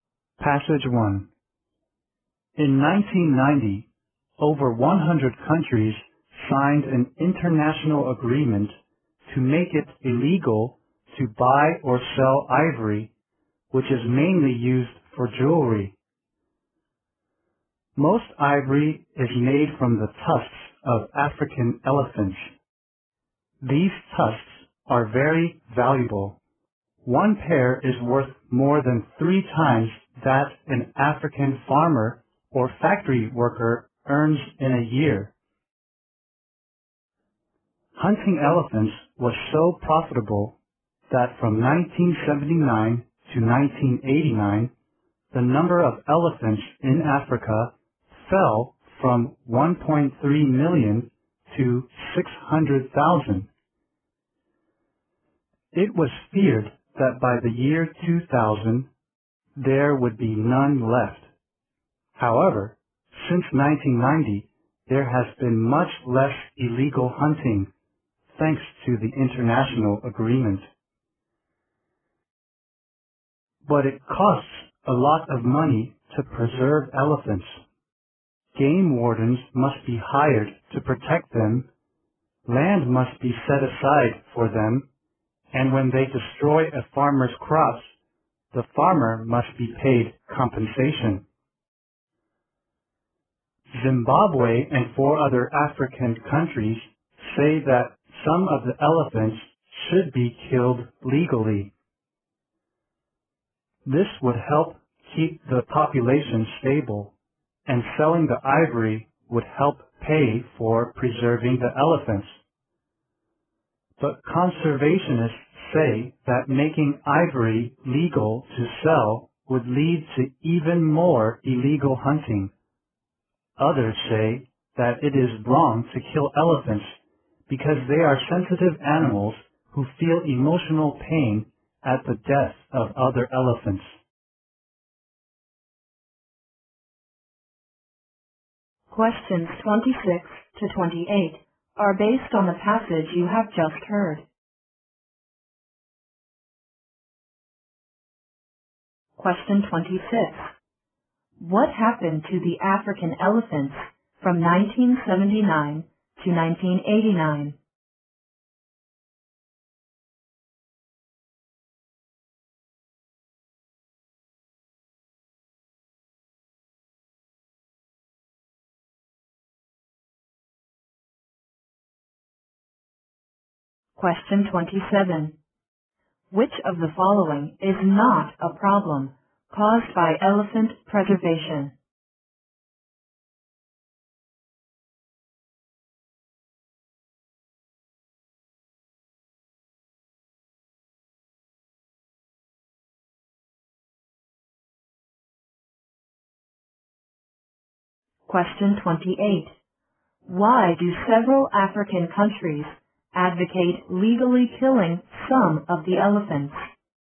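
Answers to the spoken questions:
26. Their number fell from 1.3 million to 600,000.
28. To keep the population stable and pay for preservation by selling ivory.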